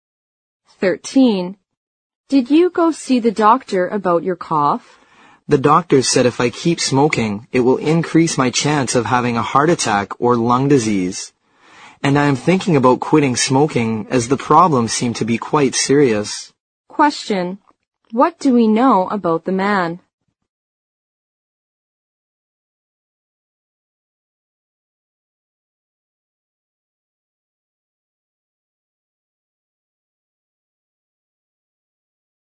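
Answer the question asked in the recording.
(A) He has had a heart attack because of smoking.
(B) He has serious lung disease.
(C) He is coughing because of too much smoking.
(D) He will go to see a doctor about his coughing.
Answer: (C) He is coughing because of too much smoking.

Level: 六级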